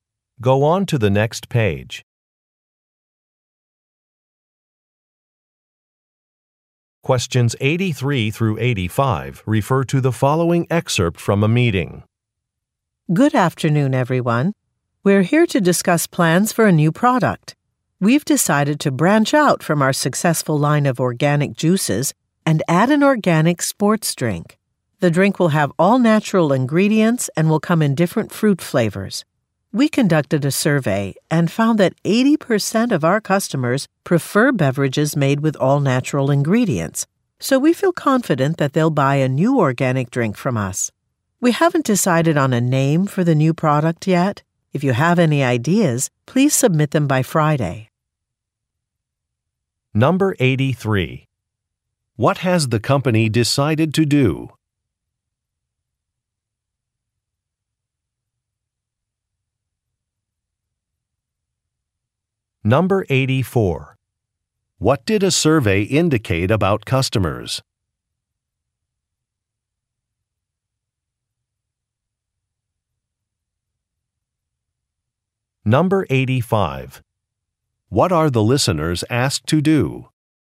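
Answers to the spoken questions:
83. Add an organic sports drink to its product line
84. 80% prefer beverages made with all natural ingredients
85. Submit name ideas for the new product by Friday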